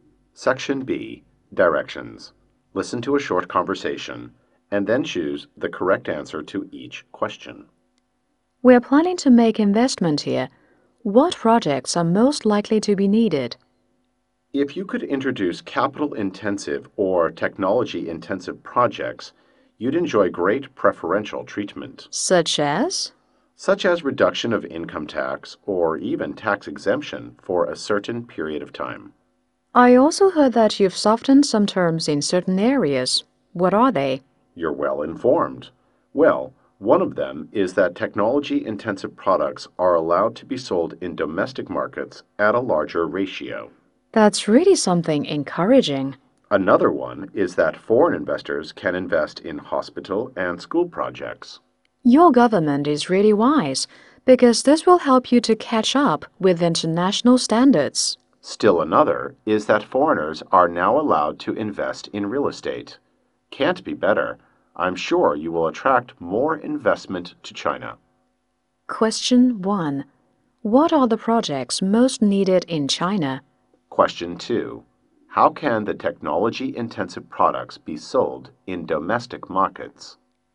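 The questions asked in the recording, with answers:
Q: Question 1. What are the projects most needed in China?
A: Capital-intensive or technology-intensive projects

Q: Question 2. How can the technology-intensive products be sold in domestic markets?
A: At a larger ratio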